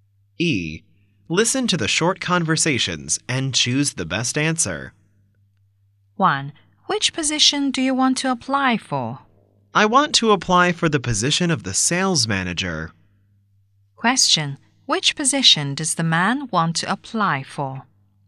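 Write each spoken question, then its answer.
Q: Which position does the man want to apply for?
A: The sales manager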